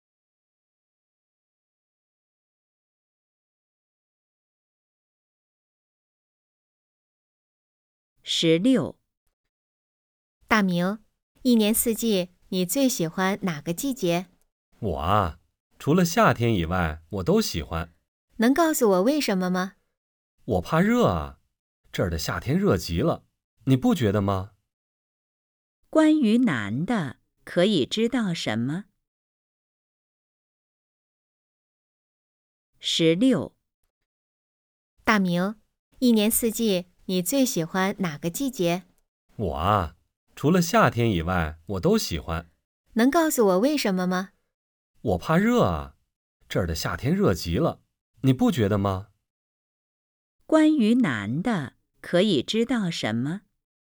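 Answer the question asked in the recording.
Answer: 他怕热,不喜欢夏天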